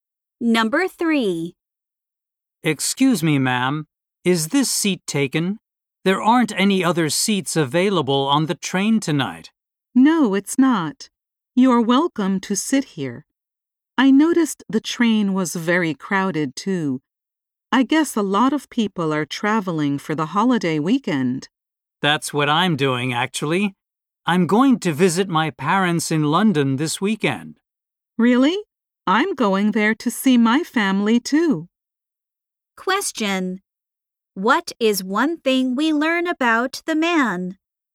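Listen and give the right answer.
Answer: He is going to London to see his family.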